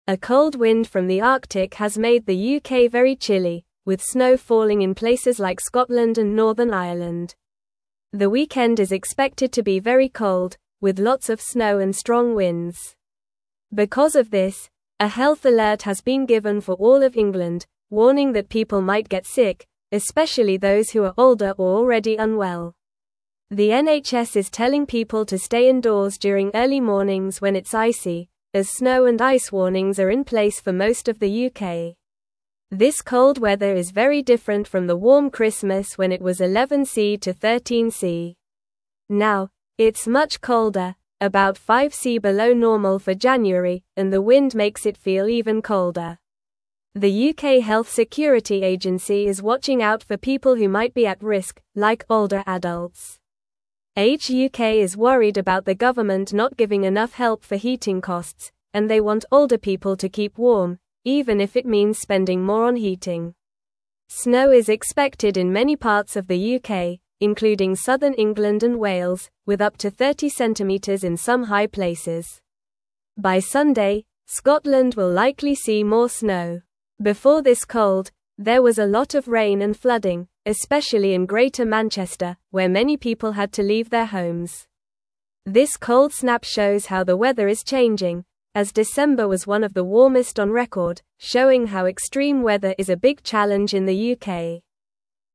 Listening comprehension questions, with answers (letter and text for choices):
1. What is causing the UK to be very chilly?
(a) A cold wind from the Arctic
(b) A warm wind from the south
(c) Heavy rain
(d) A heatwave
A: (a) A cold wind from the Arctic

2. Where is snow falling in the UK?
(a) Scotland and Northern Ireland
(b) London and Birmingham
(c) Manchester and Liverpool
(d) Cardiff and Bristol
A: (a) Scotland and Northern Ireland

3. What does the NHS advise people to do during early mornings?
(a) Go for a walk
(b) Visit friends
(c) Play outside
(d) Stay indoors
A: (d) Stay indoors

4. How much colder is it now compared to normal January weather?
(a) About 2C below normal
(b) About 5C below normal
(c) About 10C below normal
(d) About 3C below normal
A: (b) About 5C below normal

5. What is Age UK worried about?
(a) Food prices for families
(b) School closures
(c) Heating costs for older people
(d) Travel problems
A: (c) Heating costs for older people

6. How much snow is expected in some high places?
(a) Up to 10cm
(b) Up to 30cm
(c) Up to 50cm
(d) Up to 20cm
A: (b) Up to 30cm

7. What did many people in Greater Manchester have to do because of flooding?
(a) Buy new clothes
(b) Go to school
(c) Leave their homes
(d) Travel to other cities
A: (c) Leave their homes

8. What does the cold snap show about the weather?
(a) It is always the same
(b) It is getting warmer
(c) It is not important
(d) It is changing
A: (d) It is changing

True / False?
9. The weekend is expected to be very warm with strong winds.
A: False

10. A health alert has been given for some parts of England.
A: False

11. The current temperature is about 5C below normal for January.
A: True

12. Snow is falling in places like Scotland and Northern Ireland.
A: True

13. Snow is expected in many parts of the UK, including southern England and Wales.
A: True

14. Age UK is worried that older people may not get enough help for cooling costs.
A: False

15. A warm wind from the Arctic is making the UK very chilly.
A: False

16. The NHS advises people to stay indoors during early mornings when it's icy.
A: True

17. A cold (1)______ from the Arctic has made the UK very chilly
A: wind

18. Because of this, a (2)______ alert has been given for all of England,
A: health

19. (3)______ that people might get sick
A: warning

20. This cold weather is very different from the warm Christmas when it was 11C to (4)______ Now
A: 13C.

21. it's much (5)______, about 5C below normal for January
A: colder

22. and the wind (6)______ it feel even colder.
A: makes

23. like (7)______ adults.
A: older

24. Age UK is worried about the government not giving (8)______ help for (9)______ costs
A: enough

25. Age UK is worried about the government not giving (8)______ help for (9)______ costs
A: heating

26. Before this (10)______, there was a lot of rain and flooding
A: cold

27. especially in Greater (11)______, where many (12)______ had to leave their homes.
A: Manchester

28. especially in Greater (11)______, where many (12)______ had to leave their homes.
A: people

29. Where is the cold wind coming from that is making the UK chilly?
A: The cold wind is coming from the Arctic.

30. What type of weather is expected for the weekend in the UK?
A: The weekend is expected to be very cold, with lots of snow and strong winds.

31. Who is the health alert warning about getting sick?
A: The health alert is warning that older people and those who are already unwell might get sick.

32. What does the NHS suggest people do during early mornings when it's icy?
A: The NHS suggests that people stay indoors during early mornings when it's icy.

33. How much colder is it now compared to the normal temperature for January?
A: It is about 5C colder than normal for January.

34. What is Age UK worried about regarding older people's heating costs?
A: Age UK is worried that the government is not giving enough help for heating costs for older people.

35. What happened in Greater Manchester before this cold weather?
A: Before this cold weather, there was a lot of rain and flooding in Greater Manchester.

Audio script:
A cold wind from the Arctic has made the UK very chilly, with snow falling in places like Scotland and Northern Ireland. The weekend is expected to be very cold, with lots of snow and strong winds. Because of this, a health alert has been given for all of England, warning that people might get sick, especially those who are older or already unwell. The NHS is telling people to stay indoors during early mornings when it's icy, as snow and ice warnings are in place for most of the UK.
This cold weather is very different from the warm Christmas when it was 11C to 13C. Now, it's much colder, about 5C below normal for January, and the wind makes it feel even colder. The UK Health Security Agency is watching out for people who might be at risk, like older adults. Age UK is worried about the government not giving enough help for heating costs, and they want older people to keep warm, even if it means spending more on heating.
Snow is expected in many parts of the UK, including southern England and Wales, with up to 30cm in some high places. By Sunday, Scotland will likely see more snow. Before this cold, there was a lot of rain and flooding, especially in Greater Manchester, where many people had to leave their homes. This cold snap shows how the weather is changing, as December was one of the warmest on record, showing how extreme weather is a big challenge in the UK.

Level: Level 2